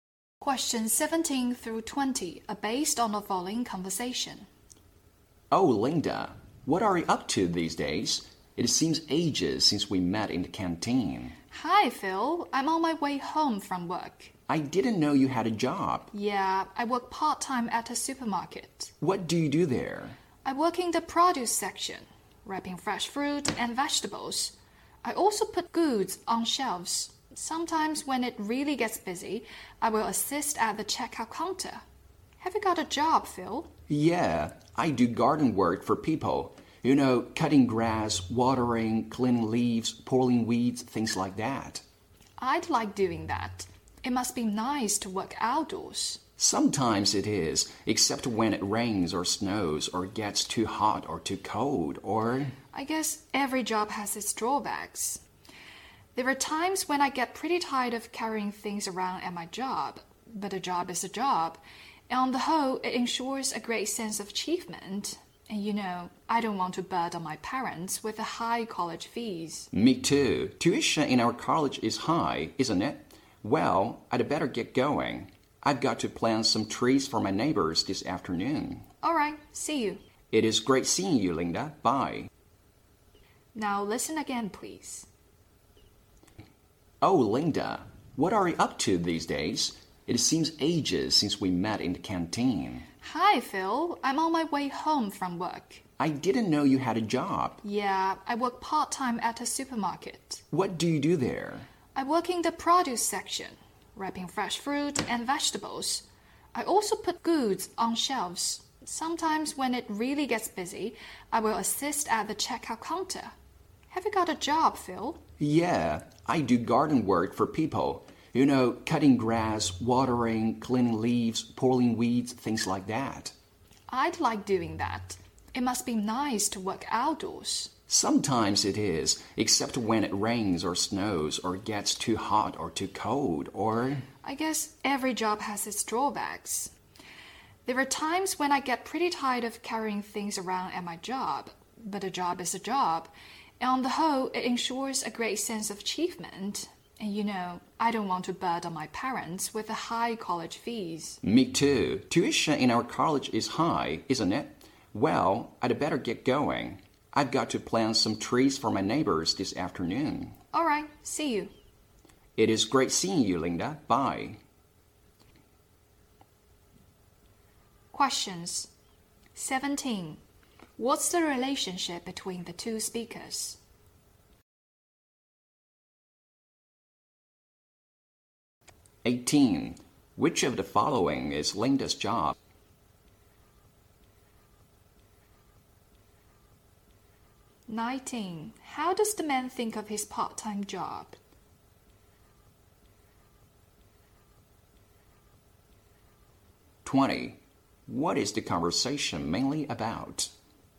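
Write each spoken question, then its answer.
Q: Which of the following is Linda's job?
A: Working part-time at a supermarket

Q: What is the conversation mainly about?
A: Their part-time jobs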